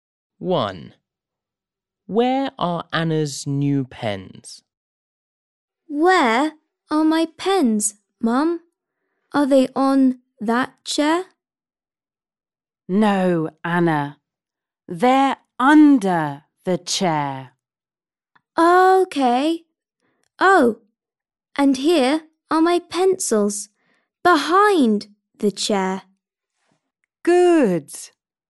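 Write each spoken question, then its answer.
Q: Where are Anna's new pens?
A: Under the chair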